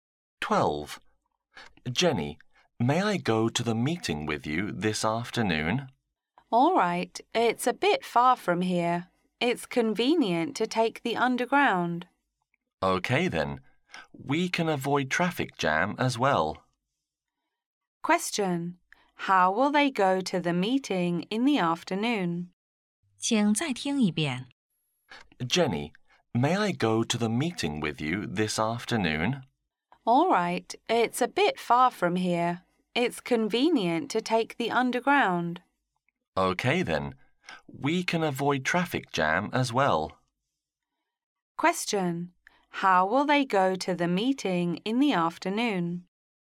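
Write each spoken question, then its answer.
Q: How will they go to the meeting in the afternoon?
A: By underground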